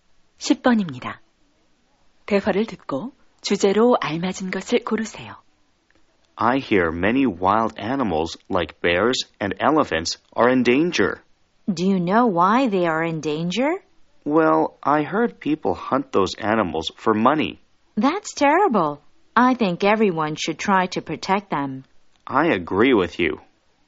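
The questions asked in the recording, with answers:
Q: 대화를 듣고 주제로 알맞은 것을 고르세요.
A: 멸종 위기의 야생 동물 보호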